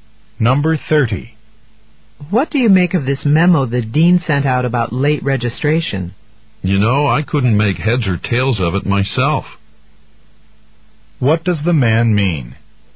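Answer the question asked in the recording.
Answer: He didn't understand the memo either.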